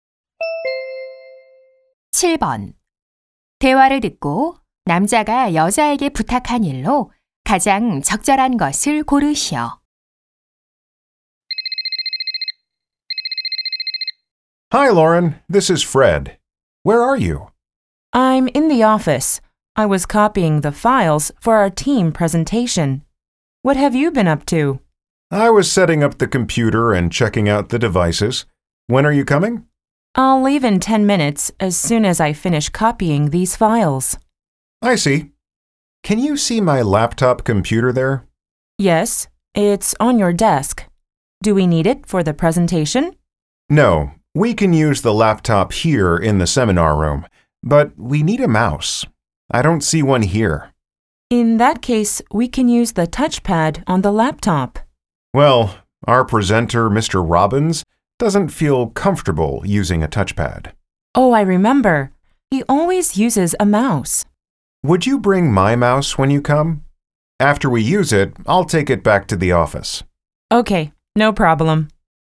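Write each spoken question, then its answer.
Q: 대화를 듣고 남자가 여자에게 부탁한 일로 가장 적절한 것을 고르시오.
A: 마우스 가져다주기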